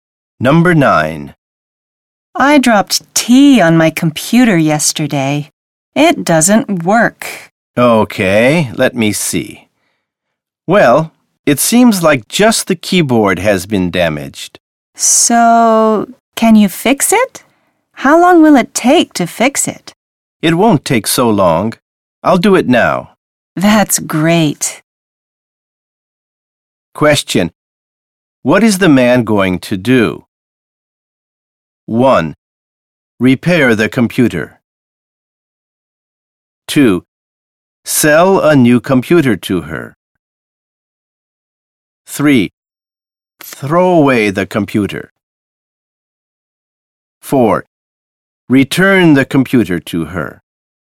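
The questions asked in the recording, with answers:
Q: What is the man going to do?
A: 1: Repair the computer.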